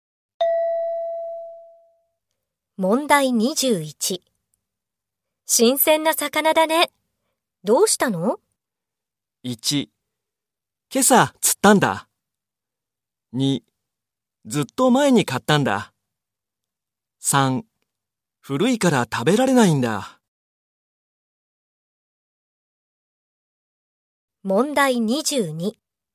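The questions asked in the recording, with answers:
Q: 新鮮な魚だね。どうしたの?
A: 1: 今朝釣ったんだ。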